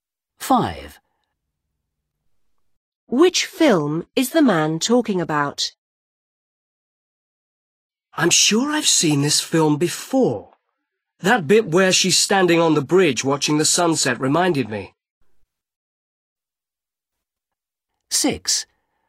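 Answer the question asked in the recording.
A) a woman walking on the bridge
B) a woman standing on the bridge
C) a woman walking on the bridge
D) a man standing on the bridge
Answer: B) a woman standing on the bridge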